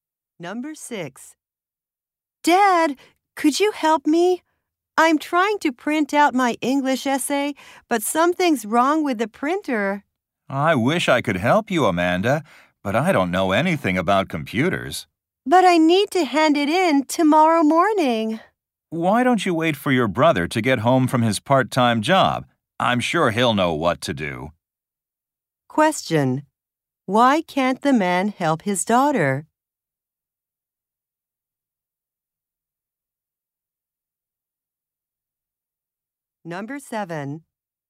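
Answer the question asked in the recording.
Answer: He doesn't know anything about computers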